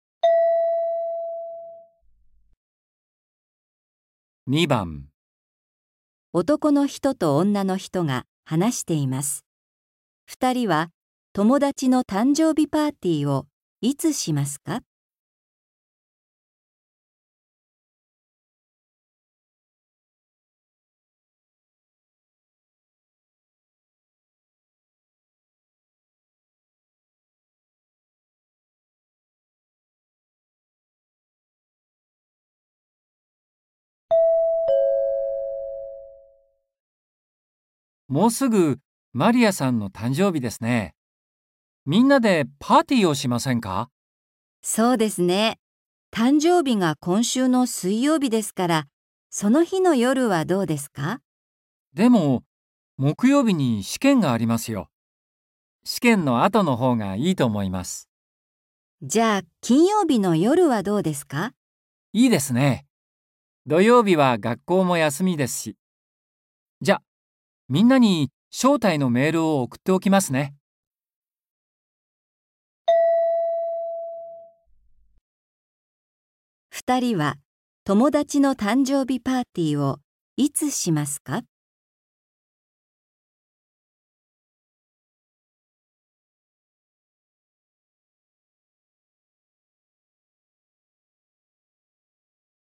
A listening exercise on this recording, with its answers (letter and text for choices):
二人は、友だちの誕生日パーティーをいつしますか。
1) 水曜日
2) 木曜日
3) 金曜日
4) 土曜日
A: 3) 金曜日

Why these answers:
じゃ、金曜日の夜はどうですか。

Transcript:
M:もうすぐマリアさんの誕生日ですね。みんなでパーティーをしませんか。
F:そうですね。誕生日が今週の水曜日ですから、その日の夜はどうですか。
M:でも、木曜日に試験がありますよ。試験の後のほうがいいと思います。
M:いいですね。土曜日は学校も休みですし。じゃ、みんなに招待のメールを送っておきますね。

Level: 初級